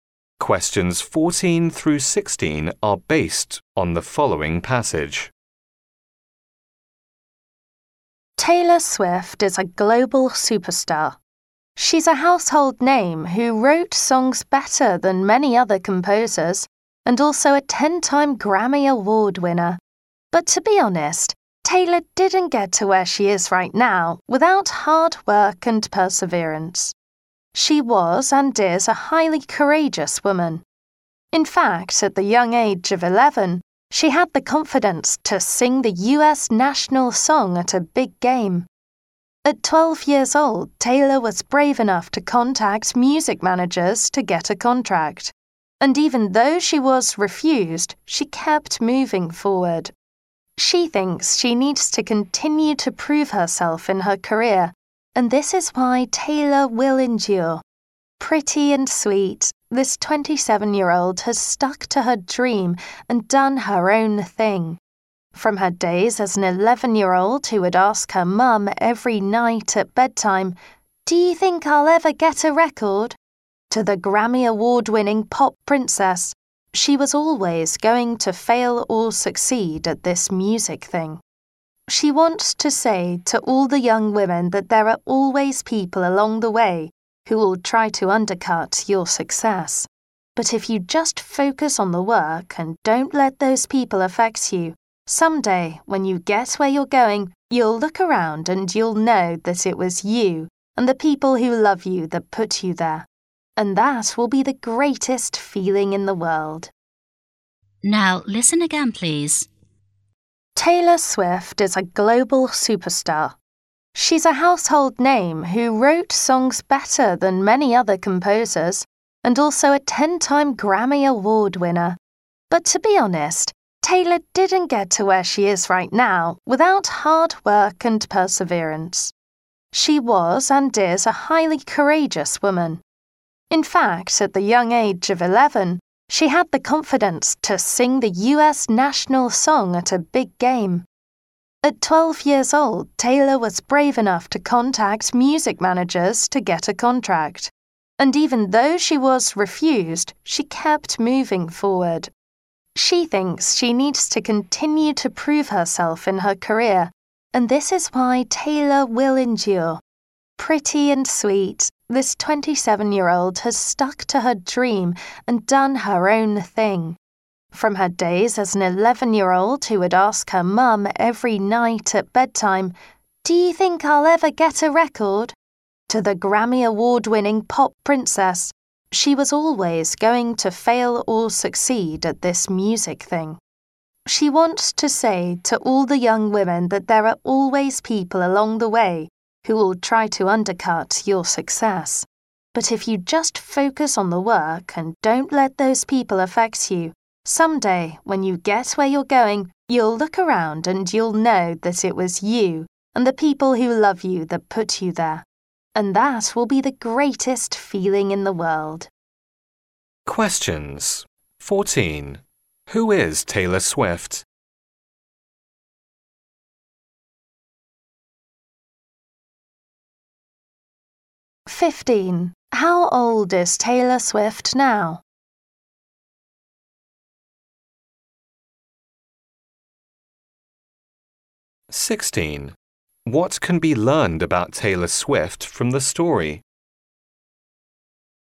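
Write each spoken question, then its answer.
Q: Who is Taylor Swift?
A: A global superstar singer and songwriter

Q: How old is Taylor Swift now?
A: 27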